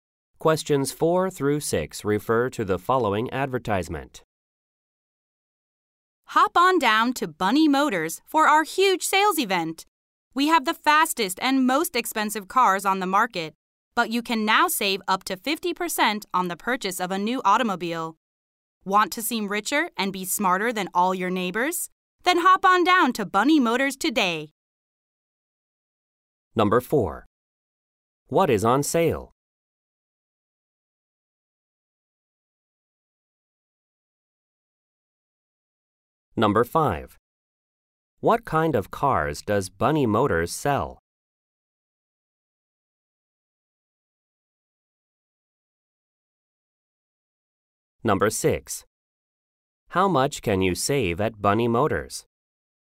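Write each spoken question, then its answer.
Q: What is on sale?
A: New cars.

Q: What kind of cars does Bunny Motors sell?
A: The fastest and most expensive cars.

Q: How much can you save at Bunny Motors?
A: Up to 50%.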